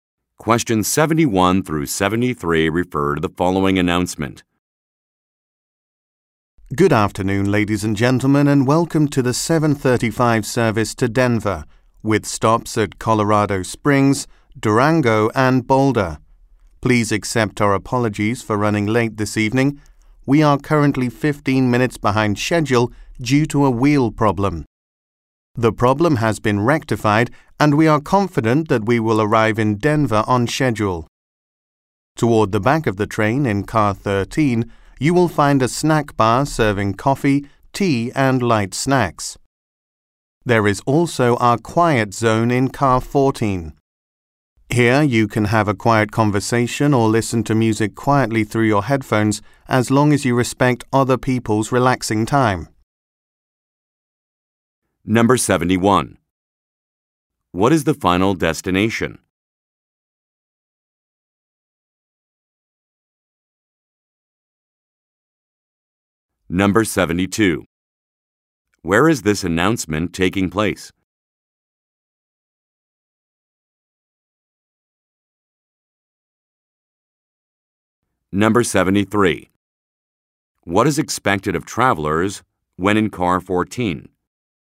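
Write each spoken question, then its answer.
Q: What is the final destination?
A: Denver

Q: Where is this announcement taking place?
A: On a train

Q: What is expected of travelers when in car 14?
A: To keep quiet and respect others' relaxing time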